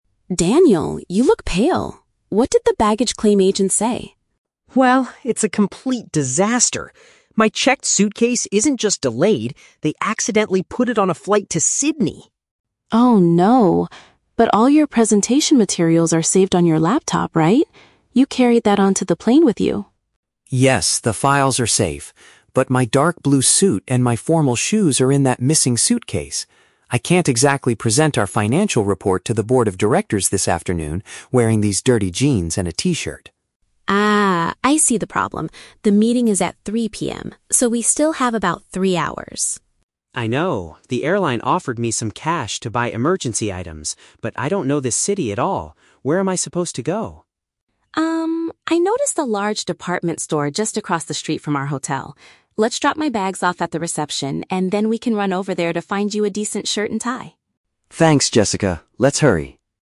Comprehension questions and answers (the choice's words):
Listen to the conversation between two colleagues at an airport and choose the correct answer (A, B, or C) for each question.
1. What is the main cause of the man's panic?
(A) He left his laptop containing the financial report on the airplane.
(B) His professional clothing was shipped to the wrong destination.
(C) His morning flight was delayed by almost three hours.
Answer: His professional clothing was shipped to the wrong destination.

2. What is the man currently wearing?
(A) Casual, unwashed clothing.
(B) A dark blue suit.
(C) A uniform provided by the airline.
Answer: Casual, unwashed clothing.

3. What do the colleagues plan to do next?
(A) Wait at the airport to collect cash from the airline agent.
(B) Borrow some clothes from the board of directors.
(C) Purchase a new outfit at a shop near their accommodation.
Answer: Purchase a new outfit at a shop near their accommodation.

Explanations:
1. The man says his "checked suitcase" was put on "a flight to Sydney," and it contains his "suit" and "formal shoes." Option B uses synonyms (professional clothing, wrong destination) to describe this situation. The Trap (A): The laptop and the presentation materials are mentioned, but the woman confirms he "carried that onto the plane," and he agrees the "files are safe." Plausible (C): Flight delays are a common problem, and the phrase "three hours" is in the audio. However, three hours is the amount of time they have left until the meeting, not a flight delay.
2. The man complains that he cannot present to the directors while wearing "these dirty jeans and a t-shirt." Option A paraphrases this as casual, unwashed clothing. The Trap (B): A dark blue suit is mentioned, but that is what is packed inside his lost suitcase, not what he is currently wearing. Plausible (C): The airline is mentioned (they gave him cash), but they did not give him a uniform to wear.
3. The woman suggests going to a "department store just across the street from our hotel" to find a "decent shirt and tie." Option C summarizes this as purchasing a new outfit near their accommodation. The Trap (A): Collecting cash from the airline is mentioned, but this is an action that already happened in the past ("The airline offered me some cash"). Plausible (B): The board of directors is mentioned as the audience for his presentation, but he is certainly not going to borrow clothes from them.

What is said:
Jessica: Daniel, you look pale. What did the baggage claim agent say?
Daniel: Well, it's a complete disaster. My checked suitcase isn't just delayed; they accidentally put it on a flight to Sydney!
Jessica: Oh no! But all your presentation materials are saved on your laptop, right? You carried that onto the plane with you.
Daniel: Yes, the files are safe. But my dark blue suit and my formal shoes are in that missing suitcase! I can't exactly present our financial report to the board of directors this afternoon wearing these dirty jeans and a t-shirt.
Jessica: Ah, I see the problem. The meeting is at 3:00 PM, so we still have about three hours.
Daniel: I know. The airline offered me some cash to buy emergency items, but I don't know this city at all. Where am I supposed to go?
Jessica: Um, I noticed a large department store just across the street from our hotel. Let's drop my bags off at the reception, and then we can run over there to find you a decent shirt and tie.